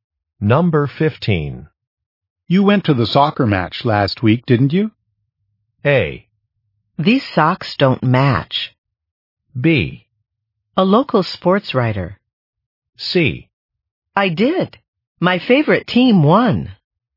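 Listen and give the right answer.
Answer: C: I did. My favorite team won.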